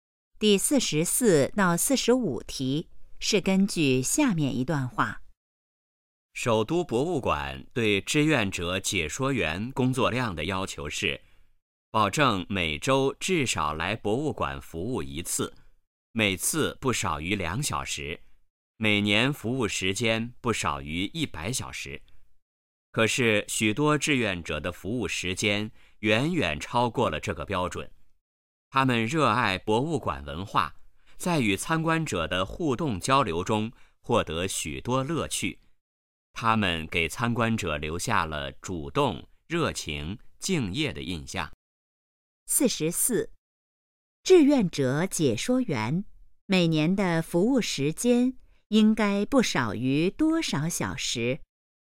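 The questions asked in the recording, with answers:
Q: 志愿者解说员每年的服务时间应该不少于多少小时?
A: 100小时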